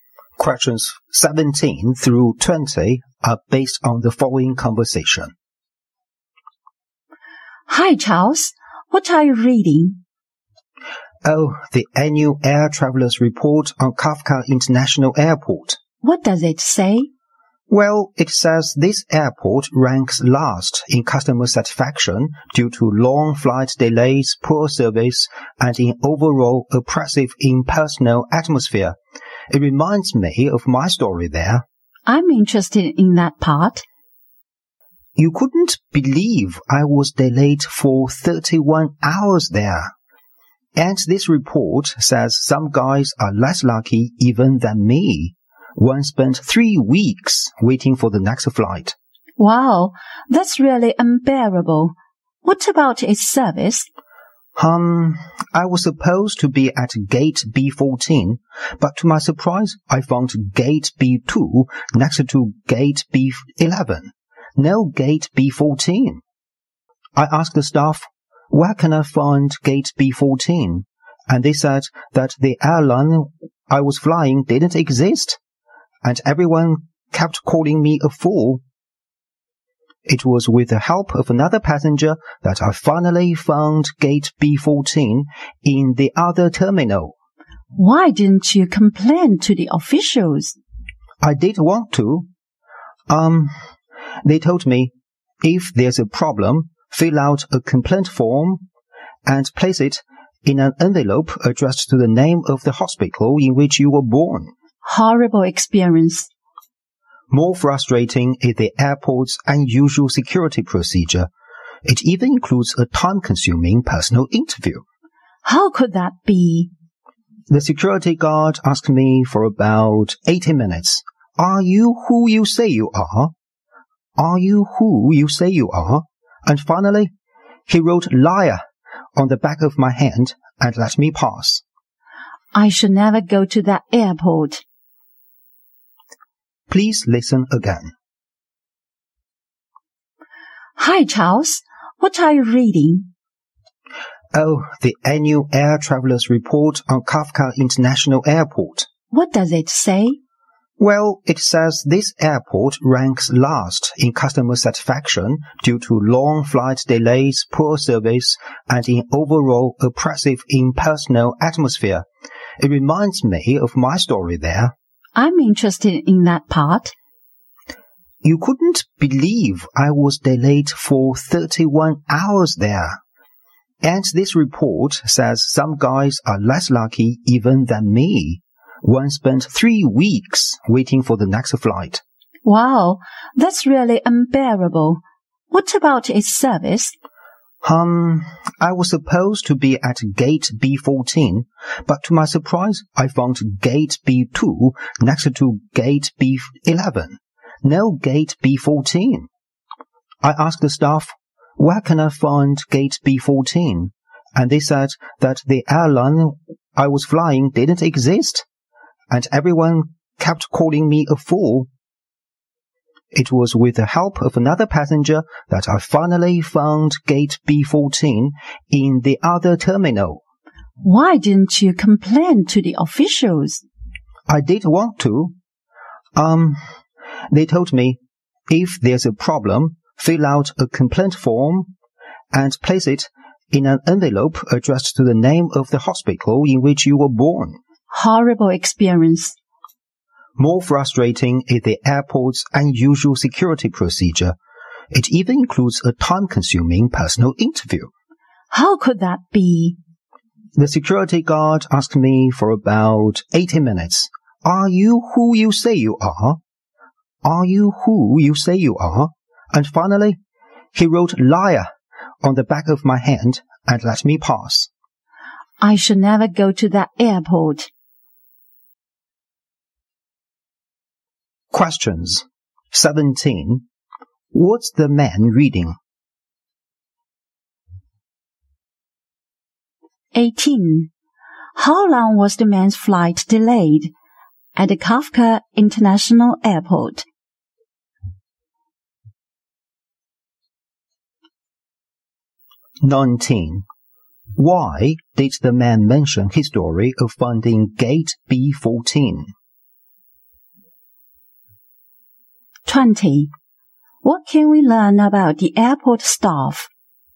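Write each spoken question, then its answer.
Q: What's the man reading?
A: The annual air traveler's report on Kafka International Airport.

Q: How long was the man's flight delayed at the Kafka International Airport?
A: 31 hours.

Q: Why did the man mention his story of finding gate B14?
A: To show how poor the airport's service was.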